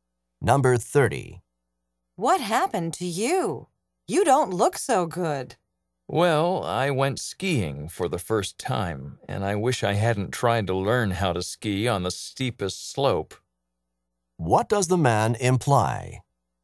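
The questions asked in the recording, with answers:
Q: What does the man imply?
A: He should have learned on an easier slope; he got hurt skiing.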